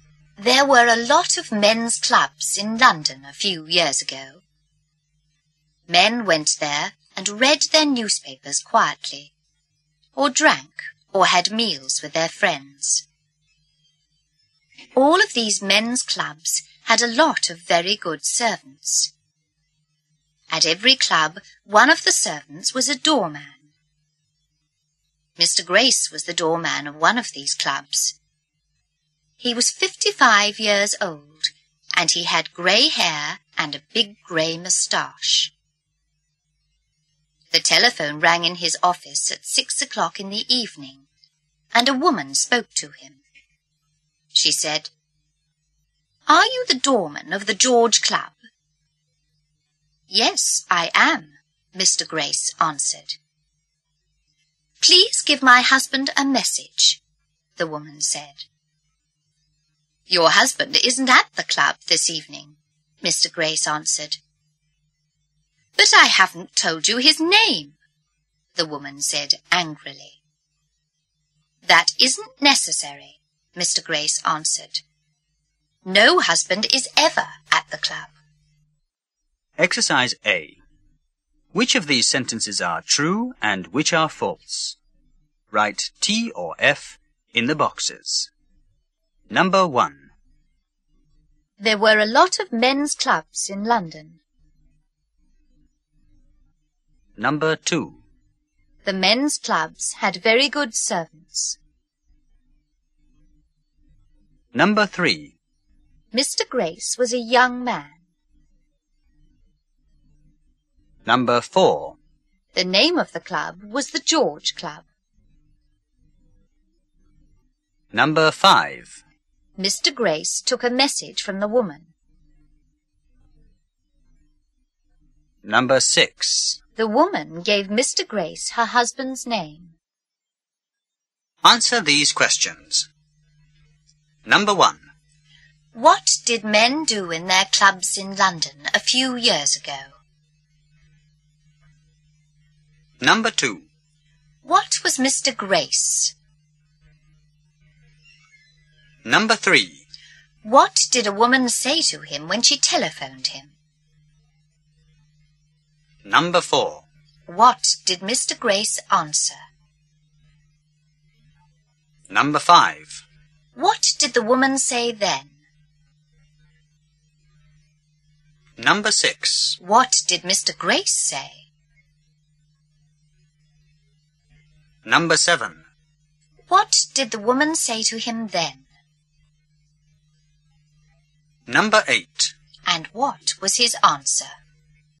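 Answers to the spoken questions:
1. True
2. True
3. False
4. True
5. False
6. False
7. They read their newspapers quietly, drank, or had meals with their friends.
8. He was the doorman of one of the clubs.
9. "Are you the doorman of the George Club?"
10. "Yes, I am."
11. "Please give my husband a message."
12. "Your husband isn't at the club this evening."
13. "But I haven't told you his name."
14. "That isn't necessary. No husband is ever at the club."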